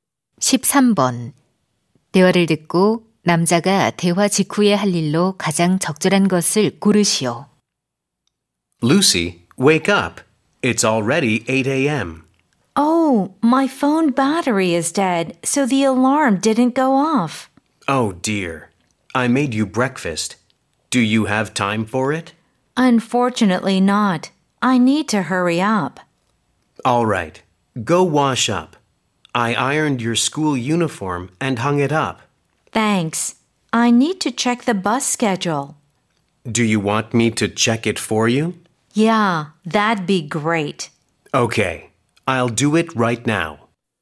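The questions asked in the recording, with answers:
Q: 대화를 듣고 남자가 대화 직후에 할 일로 가장 적절한 것을 고르시오.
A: 버스 시간표 확인하기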